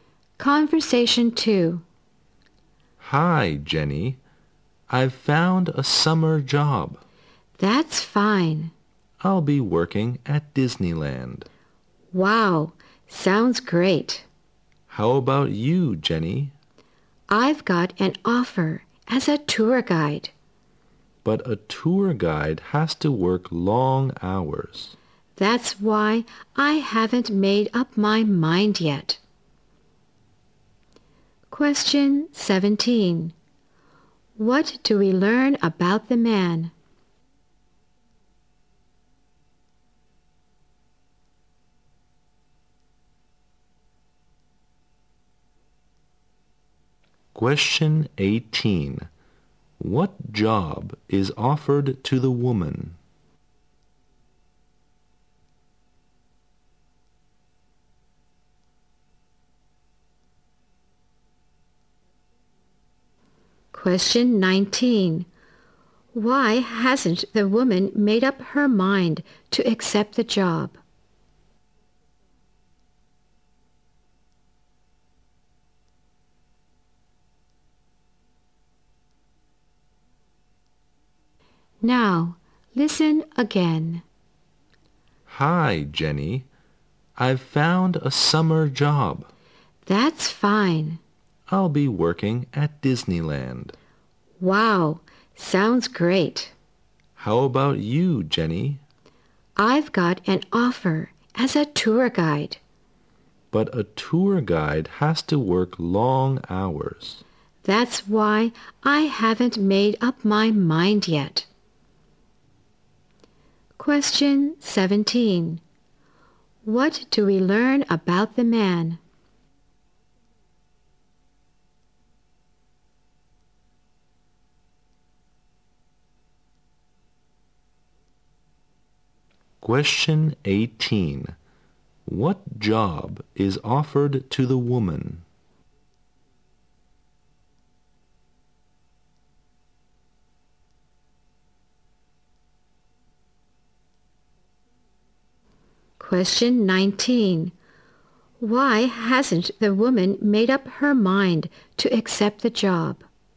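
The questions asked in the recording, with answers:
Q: What do we learn about the man?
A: He has found a summer job at Disneyland

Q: What job is offered to the woman?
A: Tour guide

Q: Why hasn't the woman made up her mind to accept the job?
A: A tour guide has to work long hours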